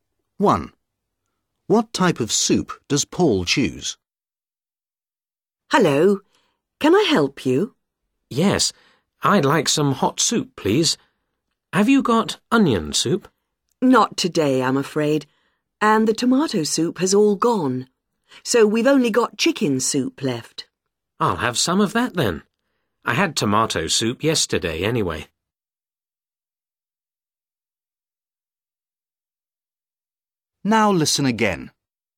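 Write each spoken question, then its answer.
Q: What type of soup does Paul choose?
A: chicken soup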